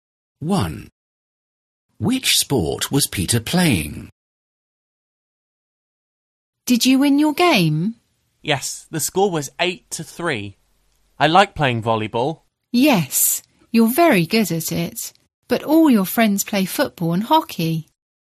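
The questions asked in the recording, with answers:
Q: Which sport was Peter playing?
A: volleyball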